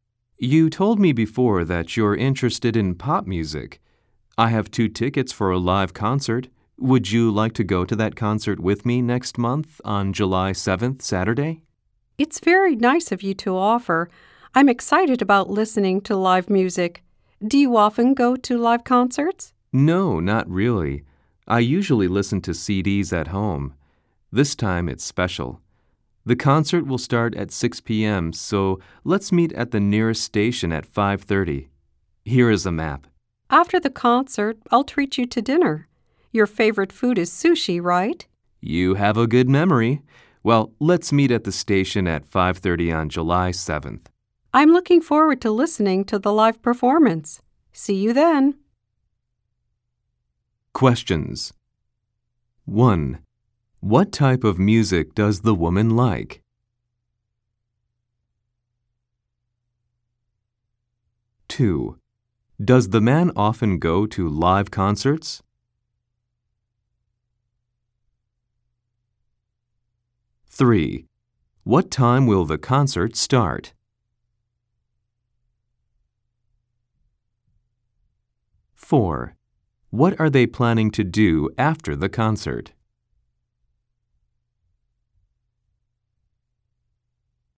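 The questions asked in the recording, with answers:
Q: What type of music does the woman like?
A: Pop music

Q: What time will the concert start?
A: At 6 p.m.

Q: What are they planning to do after the concert?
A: Have dinner (sushi)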